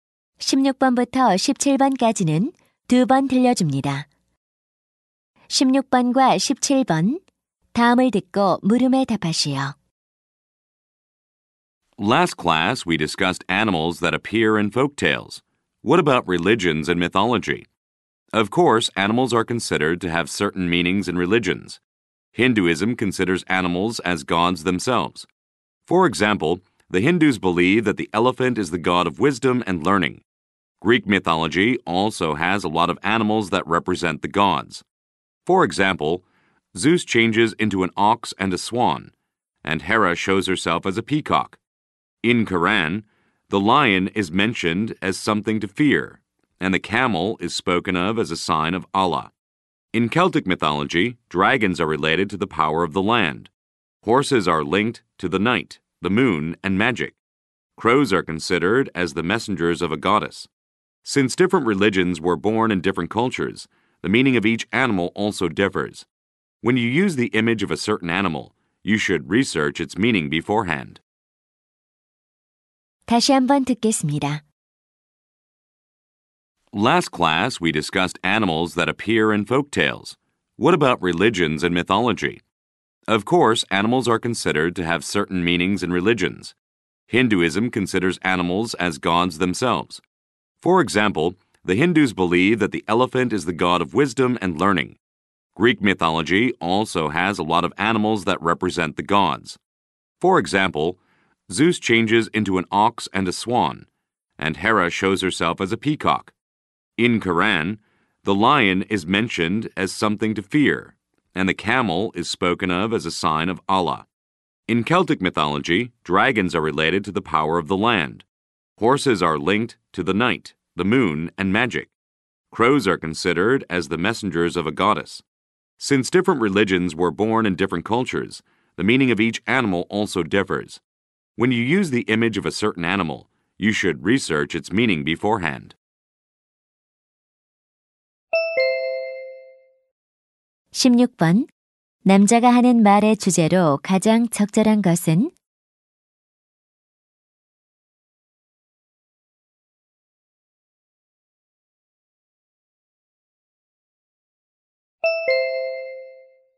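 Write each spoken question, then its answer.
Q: 남자가 하는 말의 주제로 가장 적절한 것은?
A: 종교와 신화에서 동물이 가지는 의미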